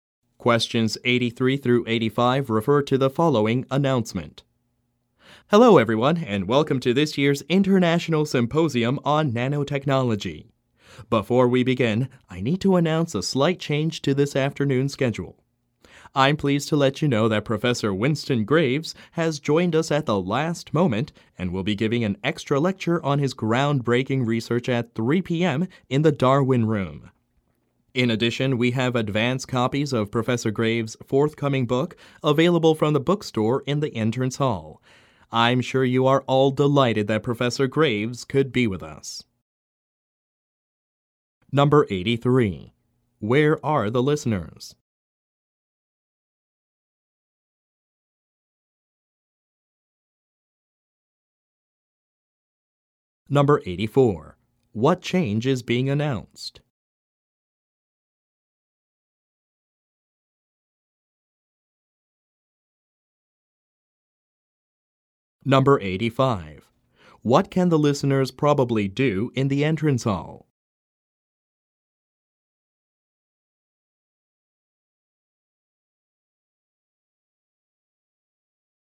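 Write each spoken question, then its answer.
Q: Where are the listeners?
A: At a symposium on nanotechnology

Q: What change is being announced?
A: An extra lecture by Professor Winston Graves has been added at 3 p.m.

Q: What can the listeners probably do in the entrance hall?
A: Buy advance copies of Professor Graves' book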